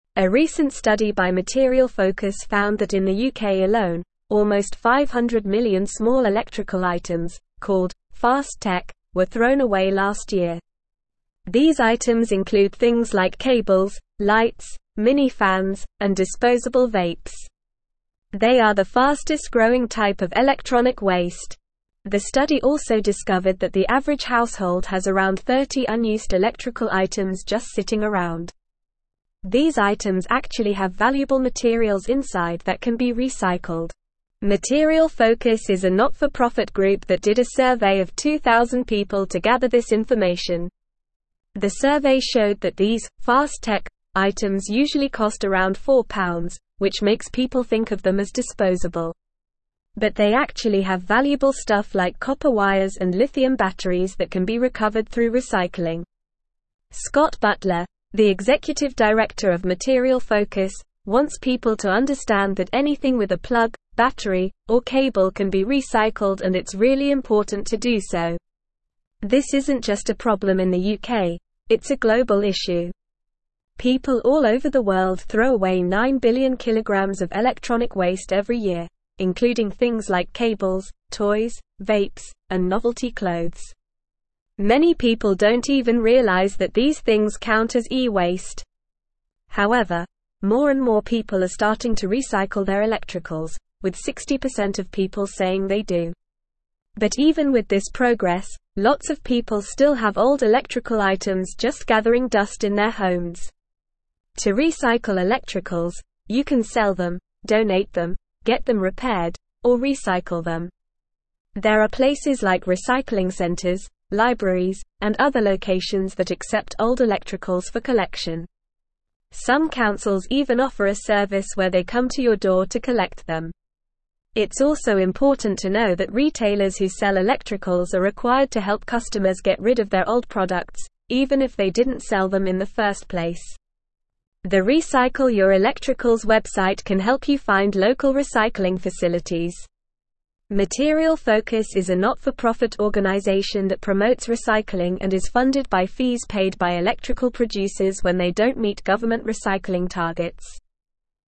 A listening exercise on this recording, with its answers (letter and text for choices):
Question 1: What is the fastest-growing type of electronic waste in the UK?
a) Cables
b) Lights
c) "Fast Tech" items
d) Disposable vapes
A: c) "Fast Tech" items

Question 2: How many unused electrical items does the average household in the UK have?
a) Around 10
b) Around 50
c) Around 20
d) Around 30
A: d) Around 30

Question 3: What valuable materials can be found inside "Fast Tech" items?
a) Copper wires and lithium batteries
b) Plastic and glass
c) Paper and cardboard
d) Aluminum and steel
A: a) Copper wires and lithium batteries

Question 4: What kind of organization is Material Focus?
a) For-profit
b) Not-for-profit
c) Government-owned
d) Private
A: b) Not-for-profit

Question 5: How much electronic waste is thrown away globally every year?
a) 5 billion kg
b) 12 billion kg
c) 7 billion kg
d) 9 billion kg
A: d) 9 billion kg

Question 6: What percentage of people say they recycle their electricals?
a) 60%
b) 40%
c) 80%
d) 20%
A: a) 60%

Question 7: What are some ways to recycle electricals?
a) Throw them away, burn them, bury them, or hide them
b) Sell them, donate them, get them repaired, or recycle them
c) Keep them, sell them, use them, or store them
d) Ignore them, forget them, lose them, or break them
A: b) Sell them, donate them, get them repaired, or recycle them

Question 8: Who is required to help customers get rid of their old electrical products?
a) Recycling centers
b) Libraries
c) Retailers who sell electricals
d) Councils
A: c) Retailers who sell electricals

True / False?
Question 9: A recent study found that less than 500 million small electrical items were thrown away in the UK last year.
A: False

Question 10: People often think of "Slow Tech" items as disposable because they usually cost around £4.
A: False

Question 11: Material Focus is a not-for-profit group that conducted a survey of 2000 people to gather this information.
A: True

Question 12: The study also found that the average household in the UK has less than 30 unused electrical items.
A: False

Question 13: These small electrical items, called "Fast Tech," include things like cables, lights, mini fans, and disposable vapes.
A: True

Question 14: 3. "Fast Tech" items are the fastest-growing type of electronic waste.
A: True

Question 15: Anything with a plug, battery, or cable cannot be recycled, and it's important not to do so.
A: False

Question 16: These unused electrical items have valuable materials inside that can be recycled, such as copper wires and lithium batteries.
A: True

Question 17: A recent (1)______ by (2)______ Focus found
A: study

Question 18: A recent (1)______ by (2)______ Focus found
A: Material

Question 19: almost 500 million small electrical (3)______, called "Fast Tech,"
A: items

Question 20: These items actually have valuable (4)______ inside that can be recycled.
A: materials

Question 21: The (5)______ showed that these "Fast Tech" items usually cost around £4, which (6)______ people think of them as (7)______.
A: survey

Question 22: The (5)______ showed that these "Fast Tech" items usually cost around £4, which (6)______ people think of them as (7)______.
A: makes

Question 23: The (5)______ showed that these "Fast Tech" items usually cost around £4, which (6)______ people think of them as (7)______.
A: disposable

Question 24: But they actually have (8)______ stuff like copper wires and lithium batteries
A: valuable

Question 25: more and more people are starting to recycle their (9)______, with 60% of people saying they do.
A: electricals

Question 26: lots of people still have old electrical items just (10)______ dust in their (11)______.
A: gathering

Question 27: lots of people still have old electrical items just (10)______ dust in their (11)______.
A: homes

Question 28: There are places like recycling (12)______, libraries, and other locations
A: centers

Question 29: Some councils even (13)______ a service where they come to your door to collect them.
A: offer

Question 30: even if they didn't sell them in the first (14)______.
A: place

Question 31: The Recycle Your Electricals (15)______ can help you find local recycling facilities.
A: website

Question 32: when they don't meet government recycling (16)______.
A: targets

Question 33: According to the study, how many small electrical items were thrown away in the UK last year?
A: almost 500 million

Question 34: What are some examples of "Fast Tech" items mentioned in the article?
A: cables, lights, mini fans, and disposable vapes

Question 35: How many unused electrical items does the average household have?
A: around 30

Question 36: What valuable materials can be found inside these "Fast Tech" items?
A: copper wires and lithium batteries

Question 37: Who conducted the survey to gather this information?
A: Material Focus

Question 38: Why do people tend to think of "Fast Tech" items as disposable?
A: they usually cost around £4

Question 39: What are some options for recycling electrical items mentioned in the article?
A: selling them, donating them, getting them repaired, or recycling them

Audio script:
A recent study by Material Focus found that in the UK alone, almost 500 million small electrical items, called "Fast Tech," were thrown away last year. These items include things like cables, lights, mini fans, and disposable vapes. They are the fastest-growing type of electronic waste. The study also discovered that the average household has around 30 unused electrical items just sitting around. These items actually have valuable materials inside that can be recycled.
Material Focus is a not-for-profit group that did a survey of 2000 people to gather this information. The survey showed that these "Fast Tech" items usually cost around £4, which makes people think of them as disposable. But they actually have valuable stuff like copper wires and lithium batteries that can be recovered through recycling. Scott Butler, the executive director of Material Focus, wants people to understand that anything with a plug, battery, or cable can be recycled and it's really important to do so.
This isn't just a problem in the UK, it's a global issue. People all over the world throw away 9 billion kg of electronic waste every year, including things like cables, toys, vapes, and novelty clothes. Many people don't even realize that these things count as e-waste. However, more and more people are starting to recycle their electricals, with 60% of people saying they do. But even with this progress, lots of people still have old electrical items just gathering dust in their homes.
To recycle electricals, you can sell them, donate them, get them repaired, or recycle them. There are places like recycling centers, libraries, and other locations that accept old electricals for collection. Some councils even offer a service where they come to your door to collect them. It's also important to know that retailers who sell electricals are required to help customers get rid of their old products, even if they didn't sell them in the first place. The Recycle Your Electricals website can help you find local recycling facilities. Material Focus is a not-for-profit organization that promotes recycling and is funded by fees paid by electrical producers when they don't meet government recycling targets.

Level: Level 3